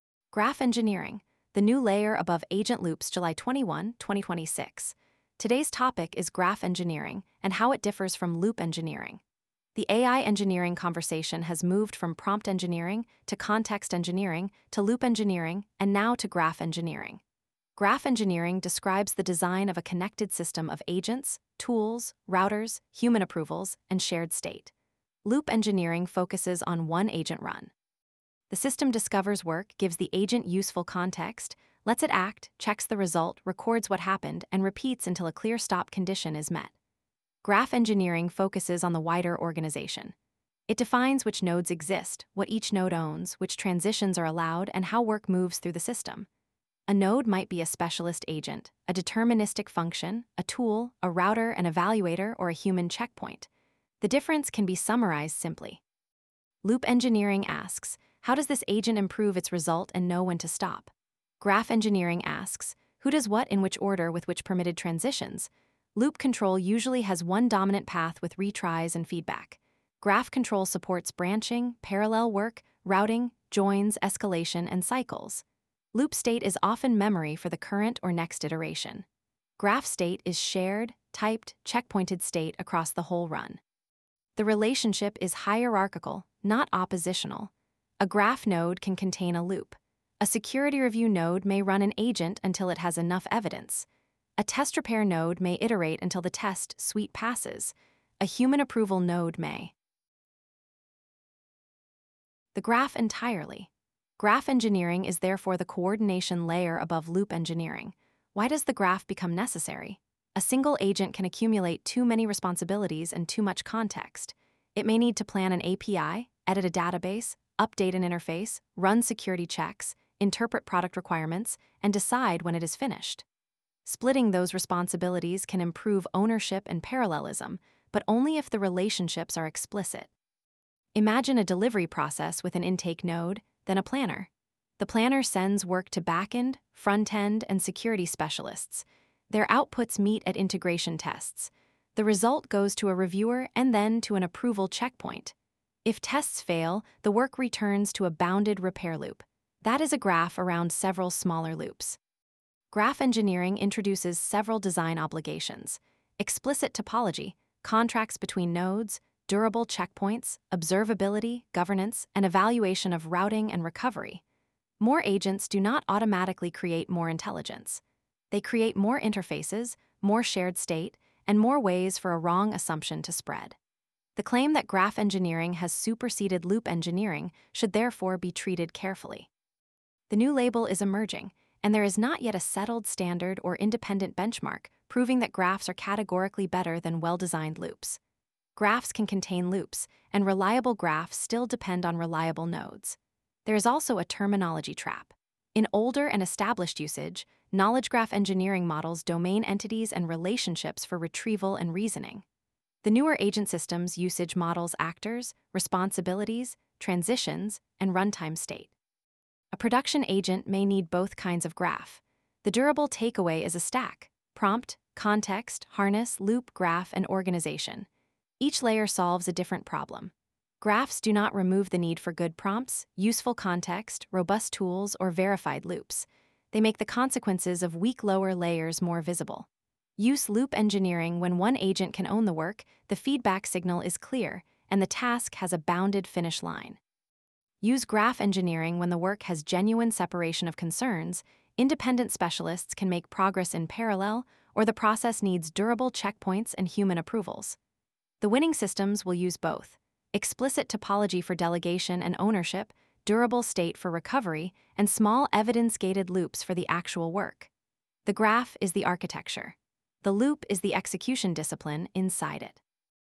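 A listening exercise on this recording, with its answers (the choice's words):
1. What is the most useful distinction between graph engineering and loop engineering?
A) Graph engineering designs system topology and coordination; loop engineering designs an agent's repeated execution and verification cycle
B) Graph engineering is only about knowledge graphs; loop engineering is only about databases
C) Graph engineering removes the need for verification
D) They are identical names for the same framework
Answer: Graph engineering designs system topology and coordination; loop engineering designs an agent's repeated execution and verification cycle

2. Which set contains only valid examples of nodes in a graph-engineered agent system?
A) Specialist agents, deterministic functions, routers, evaluators, and human checkpoints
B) Only language models and databases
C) Browser tabs and screen pixels only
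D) Prompts without tools, state, or transitions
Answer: Specialist agents, deterministic functions, routers, evaluators, and human checkpoints

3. Why is it misleading to say that graph engineering has definitively replaced loop engineering?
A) Graphs can contain loops, and the newer label has no settled standard or comparative benchmark yet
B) Loops cannot be used inside graphs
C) Graph engineering only applies to hardware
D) Loop engineering was never used for agents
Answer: Graphs can contain loops, and the newer label has no settled standard or comparative benchmark yet

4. What does knowledge-graph engineering primarily model?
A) Domain entities and relationships for retrieval and reasoning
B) Only agent permissions and approval gates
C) The audio pronunciation of workflow arrows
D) The number of retries in a coding loop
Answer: Domain entities and relationships for retrieval and reasoning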